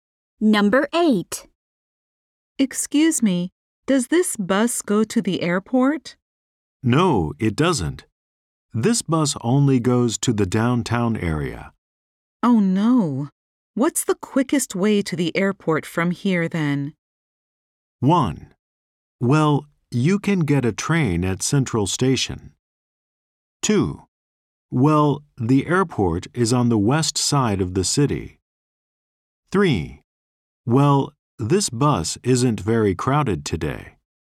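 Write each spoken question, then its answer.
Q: Oh no. What's the quickest way to the airport from here then?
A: 1: Well, you can get a train at Central Station.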